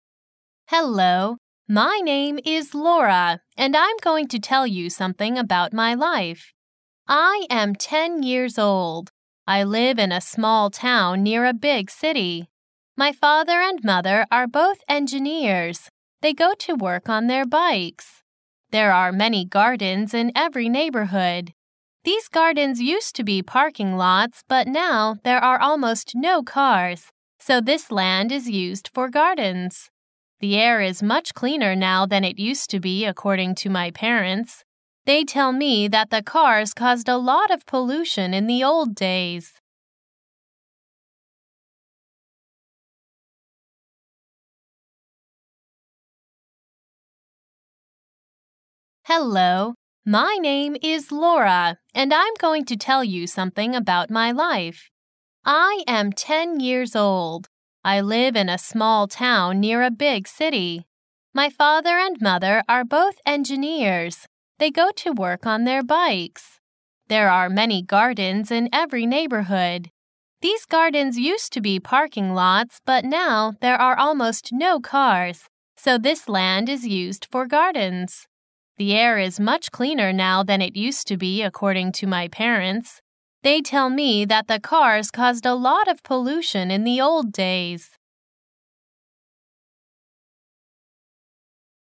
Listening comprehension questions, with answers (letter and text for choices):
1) I live in a small 1 near a big city.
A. town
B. tower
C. towel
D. down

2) My father and mother are both 2 .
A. engine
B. engineer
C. engineers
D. English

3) They go to work on their 3 .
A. bake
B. bikes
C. backs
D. likes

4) These gardens used to be 4 lots, but now there are almost no cars, so this land is used for gardens.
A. parking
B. passing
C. partner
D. party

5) The air is much cleaner now than it used to be 5 to my parents.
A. action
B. account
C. accounting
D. according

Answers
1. A. town
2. C. engineers
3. B. bikes
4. A. parking
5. D. according

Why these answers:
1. Hello. My name is Laura, and I'm going to tell you something about my life. I am ten years old. I live in a small town near a big city. My father and mother are both engineers. They go to work on their bikes. There are many gardens in every neighborhood. These gardens used to be parking lots, but now there are almost no cars, so this land is used for gardens. The air is much cleaner now than it used to be according to my parents. They tell me that the cars caused a lot of pollution in the old days.

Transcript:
My name is Laura, and I'm going to tell you something about my life. I am ten years old. I live in a small town near a big city. My father and mother are both engineers. They go to work on their bikes. There are many gardens in every neighborhood. These gardens used to be parking lots, but now there are almost no cars, so this land is used for gardens. The air is much cleaner now than it used to be according to my parents. They tell me that the cars caused a lot of pollution in the old days.